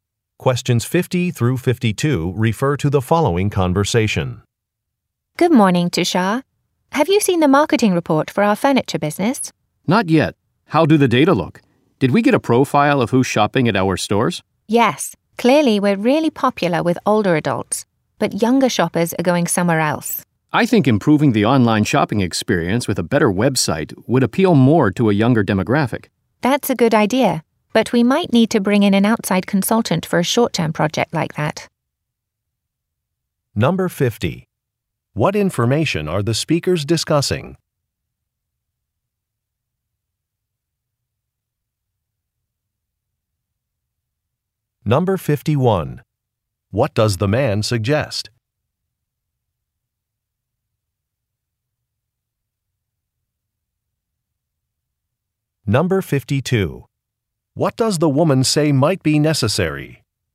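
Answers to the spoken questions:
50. A marketing report on shopper profiles
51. Improving the website
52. Hiring an outside consultant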